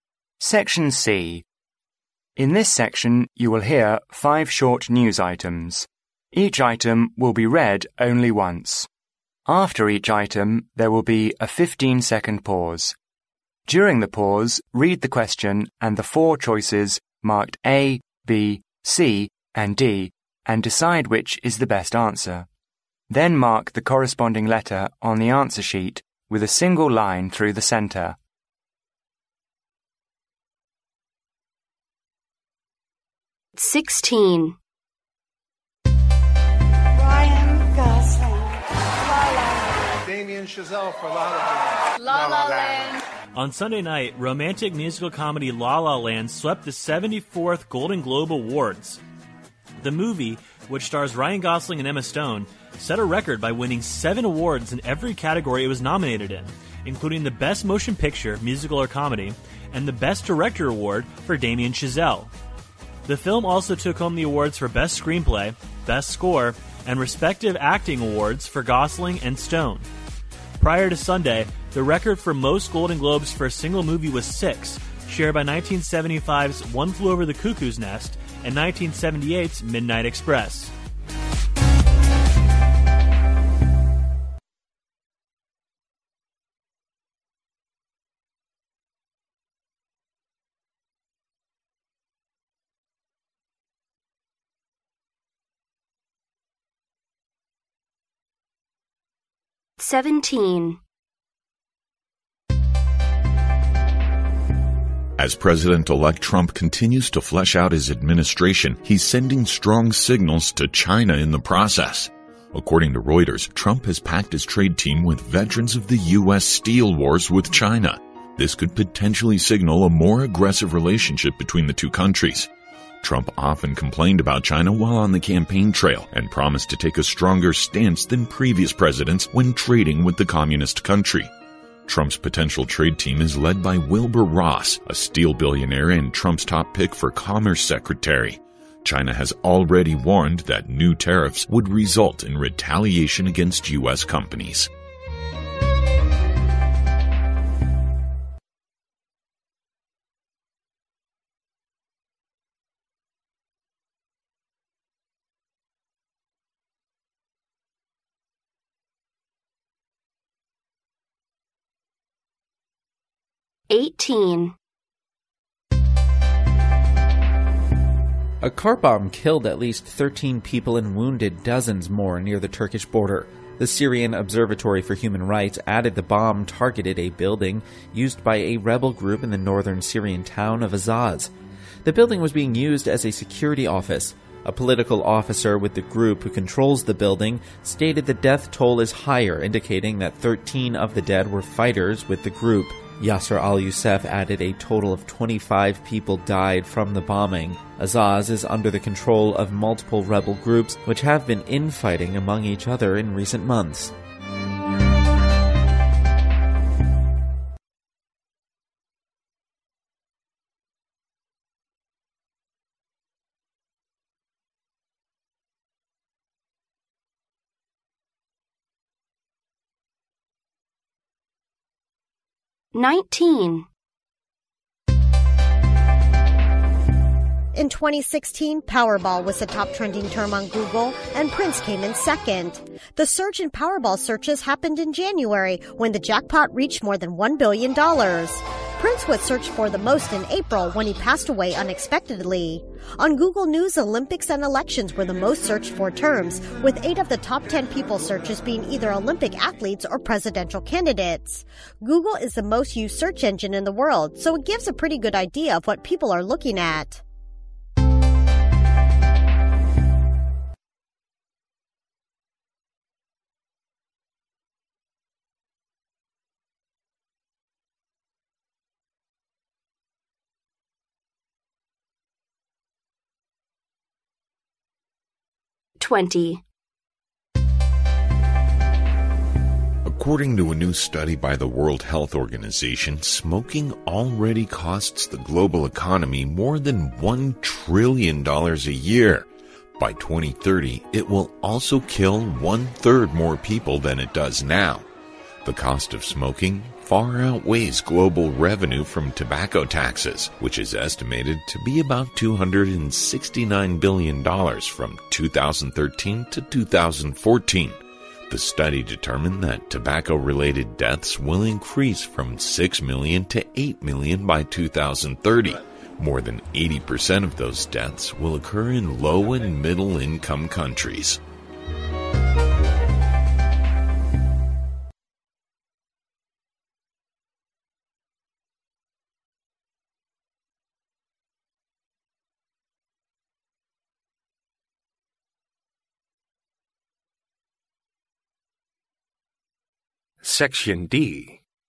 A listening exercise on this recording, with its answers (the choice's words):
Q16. How many awards did the previous record-setting movies win in the history of Golden Globe Awards?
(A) 5.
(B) 6.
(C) 7.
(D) 8.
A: 6.

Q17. Who is Wilbur Ross according to the news?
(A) A steel billionaire.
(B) Former US Commerce Secretary.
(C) A mineral dealer.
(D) CEO of a US business company.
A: A steel billionaire.

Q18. What was the building destroyed by the car bomb?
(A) A local hospital.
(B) A security office.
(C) A government office.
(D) A military training center.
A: A security office.

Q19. What made "powerball" the top trending term on Google in January 2016?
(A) A corruption scandal.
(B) A prince's passing.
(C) The jackpot game.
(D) The US presidential election.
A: The jackpot game.

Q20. What is said about smoking?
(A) Its cost is almost equivalent to the global revenue from tobacco taxes.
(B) Another 9 billion people will die from smoking by 2030.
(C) It costs the global economy almost 1 billion dollars a year.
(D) Most tobacco-related deaths will occur in low and middle income countries.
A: Most tobacco-related deaths will occur in low and middle income countries.

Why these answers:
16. 新闻最后提到在星期天之前,金球奖中单个影片获奖记录是六项。因此B选项正确。
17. 新闻最后提到Wilbur Ross是"a steel billionaire",也是特朗普眼中商务部长的第一人选。因此A选项正确。
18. 新闻中提到被袭击建筑被用于"security office"。因此B选项正确。
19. 新闻开始提到一月份"jackpot"达到超过10亿时,出现了对"powerball"的搜索。因此C选项正确。
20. 新闻最后提到在吸烟致死的人中,80%出现在"low and middle income countries"。因此D选项正确。

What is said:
In this section, you will hear five short news items. Each item will be read only once: After each item, there will be a fifteen-second pause. During the pause, read the question and the four choices marked A, B, C and D, and decide which is the best answer. Then mark the corresponding letter on the answer sheet with a single line through the centre.
On Sunday night, romantic musical comedy " La La Land " swept the 74th Golden Globe Awards. The movie, which stars Ryan Gosling and Emma Stone, set a record by winning seven awards in every category it was nominated in, including best motion picture—musical or comedy and the best director award for Damien Chazelle. The film also took home the awards for best screenplay, best score and respective acting awards for Gosling and Stone. Prior to Sunday, the record for most Golden Globes for a single movie was six, shared by 1975's One Flew Over the Cuckoo's Nest and 1978's Midnight Express .
17 Who is Wilbur Ross according to the news?
As president-elect Trump continues to flesh out his administration he's sending strong signals to China in the process. According to Reuters, Trump has packed his trade team with veterans of the US steel wars with China. This could potentially signal a more aggressive relationship between the two countries. Trump often complained about China while on the campaign trail and promised to take a stronger stance than previous presidents when trading with the communist country. Trump's potential trade team is led by Wilbur Ross, a steel billionaire and Trump's top pick for commerce secretary. China has already warned that new tariffs would result in retaliation against US companies.
18 What was the building destroyed by the car bomb?
A car bomb killed at least 13 people and wounded dozens more near the Turkish border. The Syrian Observatory for Human Rights added the bomb targeted a building used by a rebel group in the northern Syrian town of Azaz. The building was being used as a security office. A political officer with the group who controls the building, stated the death toll is higher, indicating that 13 of the dead were fighters with the group. Yasser al-Yousef added a total of 25 people died from the bombing. Azaz is under the control of multiple rebel groups, which have been in fighting among each other in recent months.
19 What made "powerball" the top trending term on Google in January 2016?
In 2016, "powerball" was the top trending term on Google and "Prince" came in second. The surge in "powerball" searches happened in January when the jackpot reached more than $1 billion. "Prince" was searched for the most in April when he passed away unexpectedly. On Google News, "Olympics" and "Elections" were the most searched-for terms, with eight of the top 10 people searches being either Olympic athletes or presidential candidates. Google is the most used search engine in the world, so it gives a pretty good idea of what people are looking at.
20 What is said about smoking?
According to a new study by the World Health Organization, smoking already costs the global economy more than 1 trillion dollars a year. By 2030, it will also kill one third more people than it does now. The cost of smoking "far outweighs global revenue from tobacco taxes", which is estimated to be about 269 billion dollars from 2013 to 2014. The study determined that tobacco-related deaths will increase from 6 million to 8 million by 2030. More than 80 percent of those deaths will occur in low and middle income countries.
Section D (10 marks)